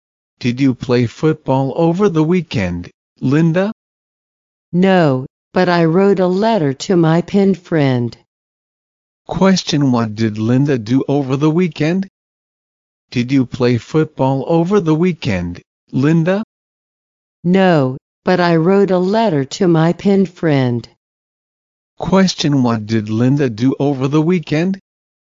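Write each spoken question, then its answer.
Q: Question, what did Linda do over the weekend?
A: She wrote a letter to her pen friend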